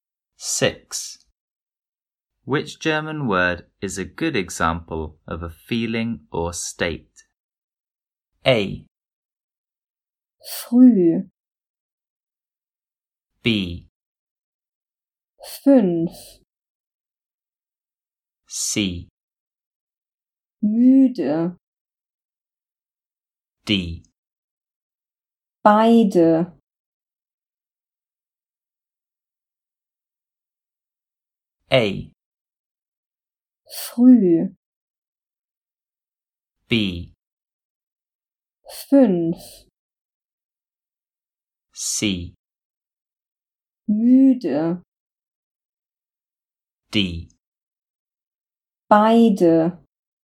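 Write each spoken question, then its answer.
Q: Which German word is a good example of a feeling or state?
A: C: Müde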